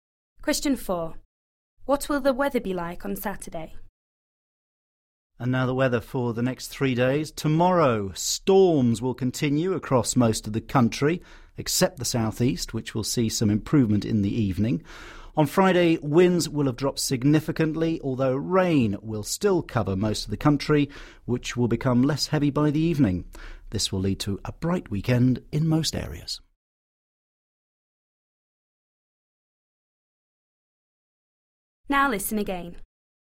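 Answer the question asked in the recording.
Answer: Bright/sunny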